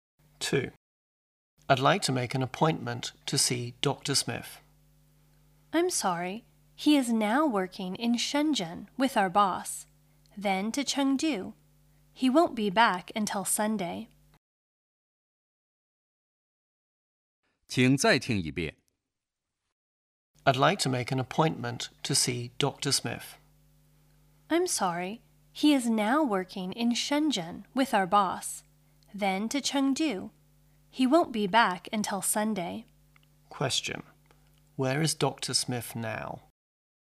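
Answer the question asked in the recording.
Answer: In Shenzhen.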